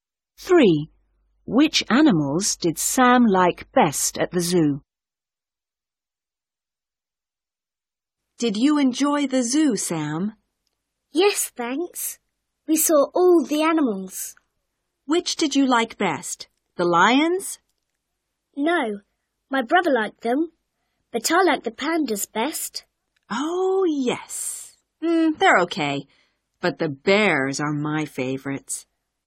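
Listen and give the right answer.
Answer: The pandas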